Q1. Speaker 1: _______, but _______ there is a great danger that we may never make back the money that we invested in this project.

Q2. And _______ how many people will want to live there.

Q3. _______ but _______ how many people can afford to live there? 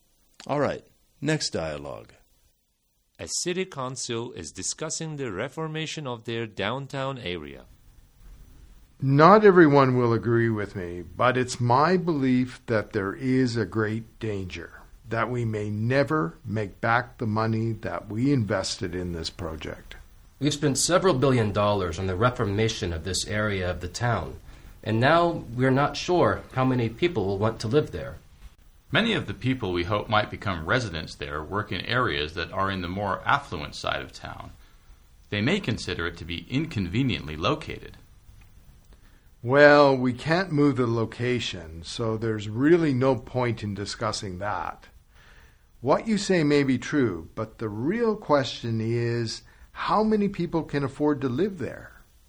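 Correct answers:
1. Not everyone will agree with me; it's my belief that
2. now we're not sure
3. What you say may be true; the real question is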